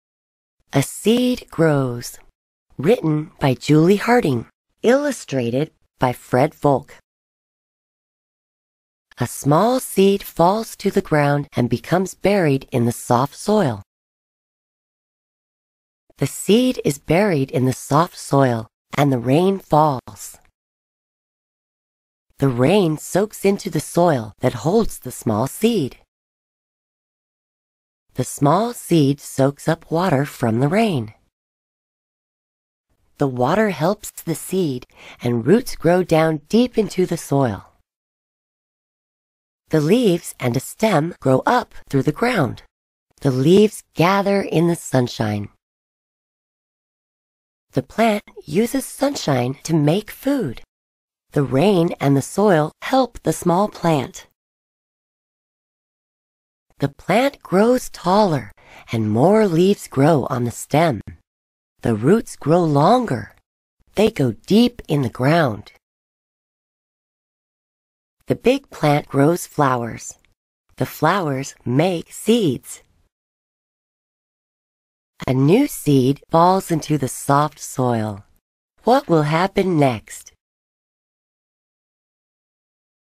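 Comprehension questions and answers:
After the story, let's think about these questions.听完故事后,我们来思考一下这些问题:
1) Do you know what things are needed when a seed grows?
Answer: Soft soil, rain (water) and sunshine.

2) How do the little plants gather in the sunshine?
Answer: With their leaves; the leaves gather in the sunshine to make food.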